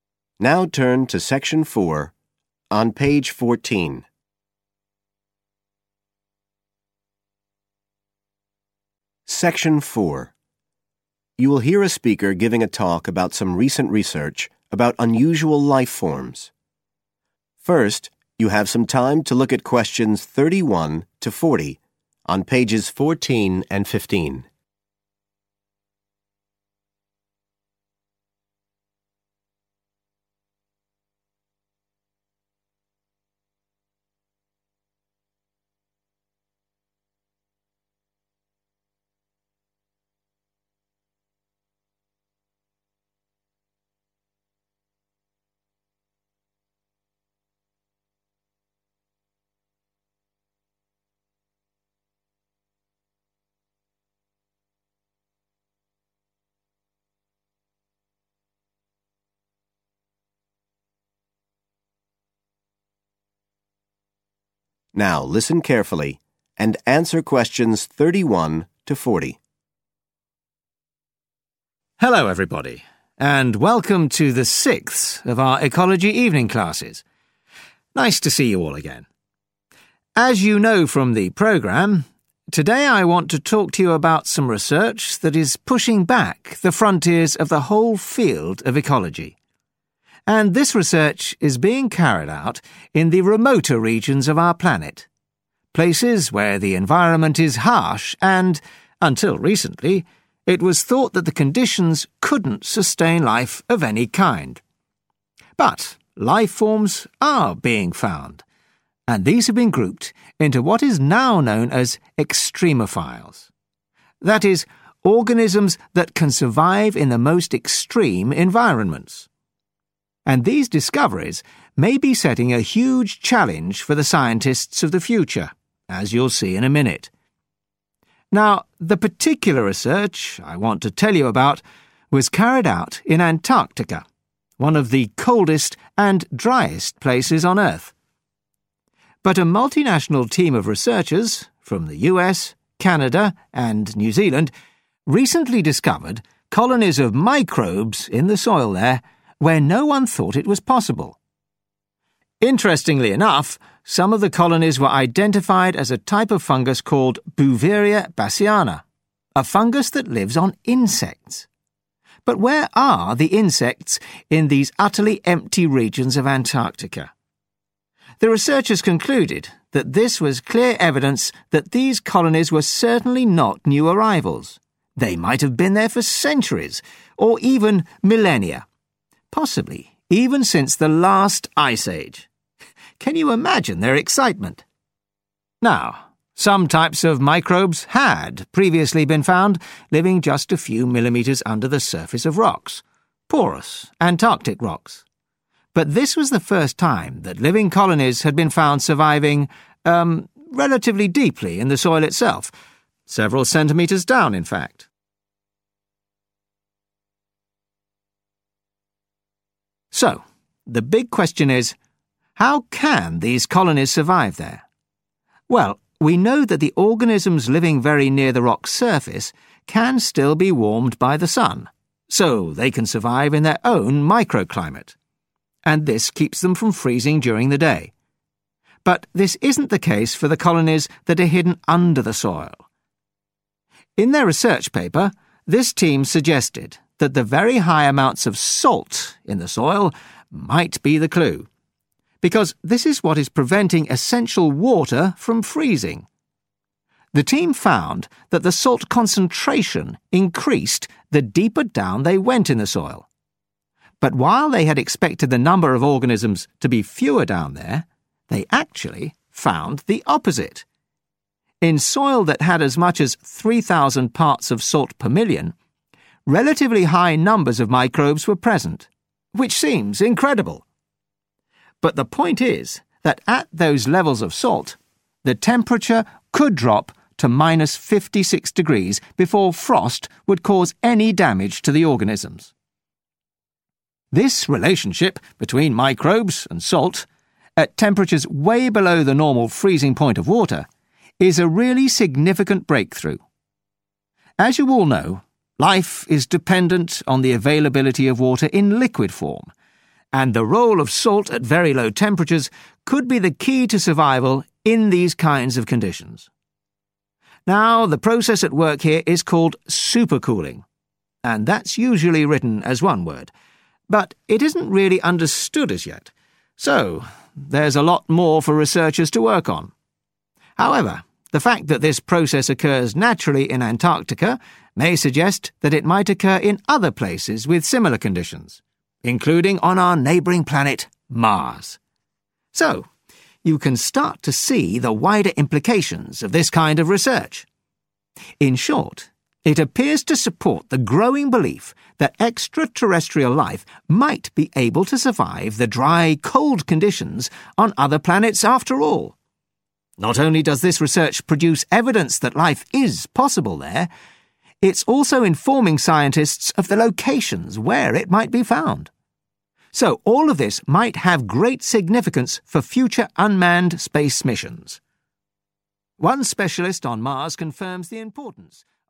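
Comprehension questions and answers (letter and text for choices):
Choose the correct answer, A-C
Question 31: 'Extremophiles' are life forms that can live in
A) isolated areas.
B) hostile conditions.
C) new habitats.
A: B) hostile conditions.

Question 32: The researchers think that some of the organisms they found in Antarctica are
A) new species.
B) ancient colonies.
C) types of insects.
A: B) ancient colonies.

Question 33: The researchers were the first people to find life forms in Antarctica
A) in the soil.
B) under the rock surface.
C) on the rocks.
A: A) in the soil.

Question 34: Access to the sun's heat can create a................... for some organisms.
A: microclimate

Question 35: The deeper the soil, the higher the........... of salt.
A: concentration

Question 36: Salt can protect organisms against the effects of.................. , even at very low temperatures.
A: frost

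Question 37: All living things must have access to.............. water.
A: liquid

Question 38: Salt plays a part in the process of................. , which prevents freezing.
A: supercooling

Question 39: The environment of..................... is similar to the dry valleys of Antarctica.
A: Mars

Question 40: This research may provide evidence of the existence of extraterrestrial life forms and their possible.............. on other planets.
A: locations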